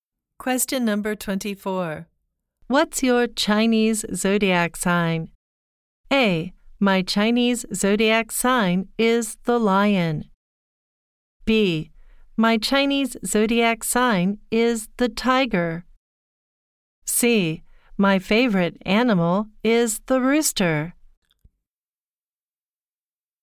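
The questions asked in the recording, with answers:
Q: What's your Chinese zodiac sign?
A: B: My Chinese zodiac sign is the tiger.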